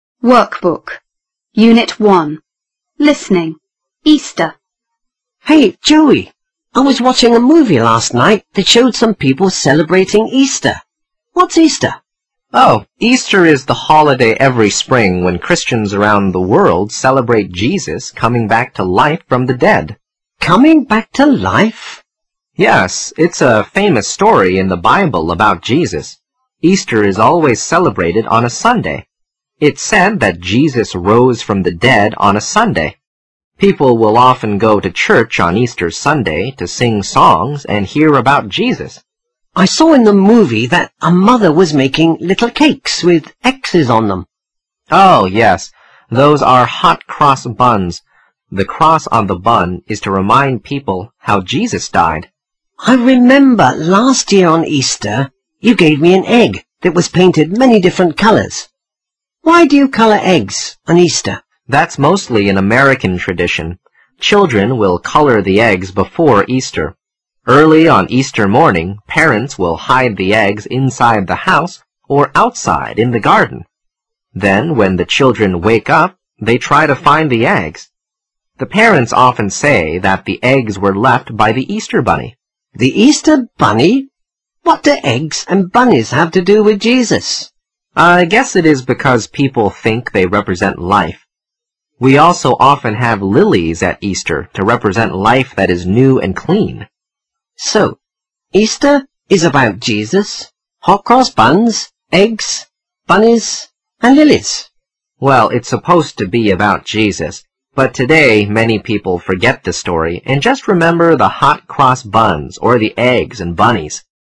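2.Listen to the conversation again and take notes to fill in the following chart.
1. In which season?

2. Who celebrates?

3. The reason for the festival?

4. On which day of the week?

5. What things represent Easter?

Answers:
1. spring
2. Christians around the world
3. To celebrate Jesus coming back to life from the dead
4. Sunday
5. hot cross buns, coloured eggs, the Easter bunny and lilies

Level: 高中英语必修三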